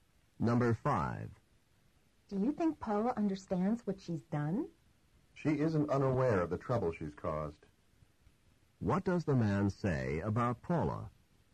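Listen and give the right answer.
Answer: Paula knows the trouble she's caused.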